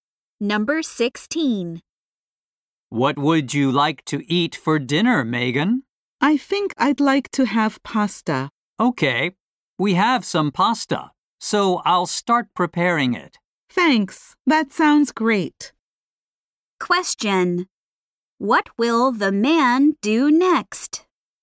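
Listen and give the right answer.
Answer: Start preparing pasta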